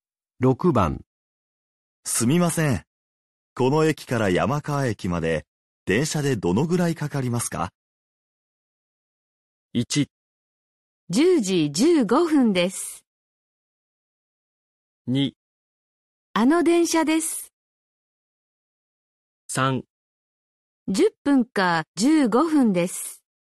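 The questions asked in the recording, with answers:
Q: すみません。この駅から山川駅まで電車でどのぐらいかかりますか?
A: 3: 10分か15分です。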